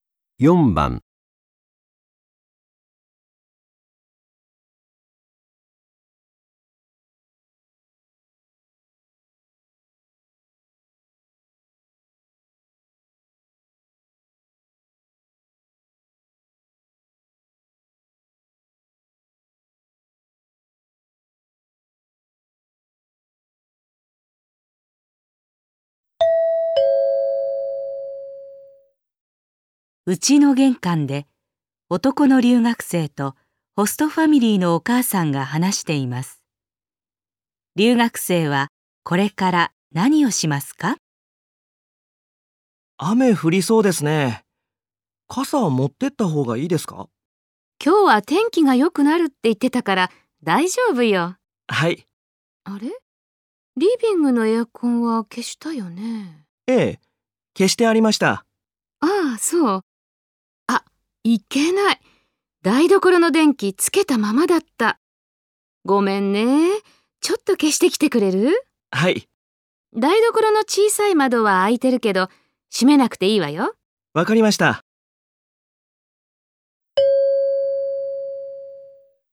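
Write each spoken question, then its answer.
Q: 留学生はこれから何をしますか?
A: 台所の電気を消す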